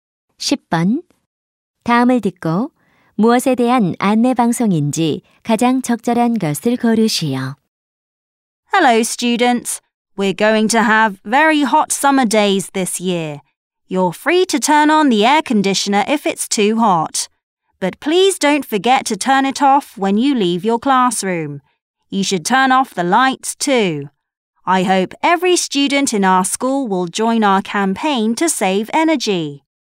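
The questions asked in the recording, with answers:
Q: 다음을 듣고 무엇에 대한 안내 방송인지 가장 적절한 것을 고르시오.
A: 에너지 절약 캠페인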